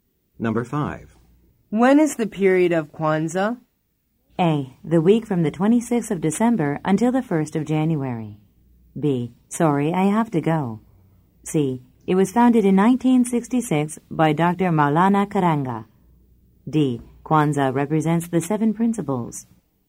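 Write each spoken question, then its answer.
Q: When is the period of Kwanzaa?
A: A: The week from the 26th of December until the 1st of January.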